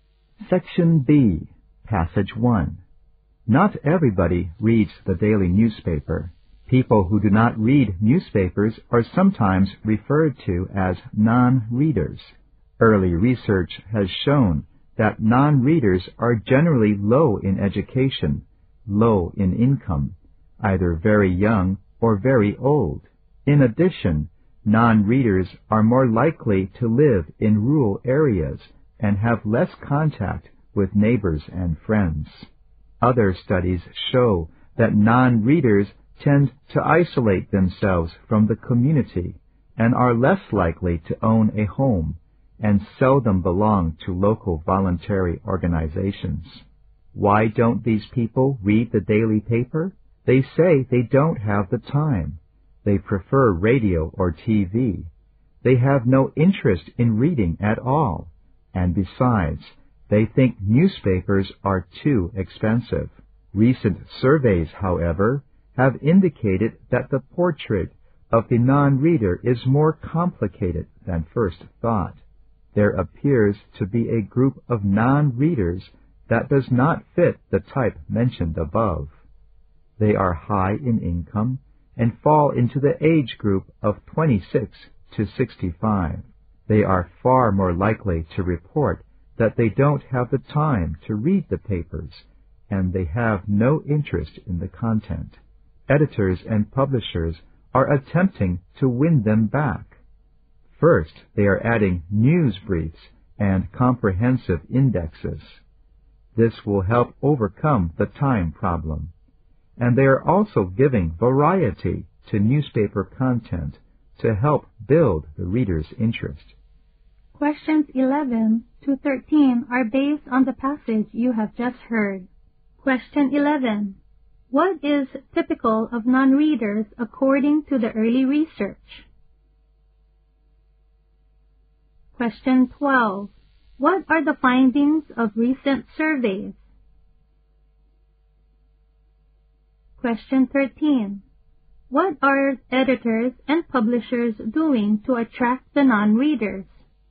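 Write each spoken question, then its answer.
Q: What is typical of non-readers according to the early research?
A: Low in education and income, very young or very old

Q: What are the findings of recent surveys?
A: Some non-readers are high-income people aged 26 to 65

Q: What are editors and publishers doing to attract the non-readers?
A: Adding news briefs and indexes and varying content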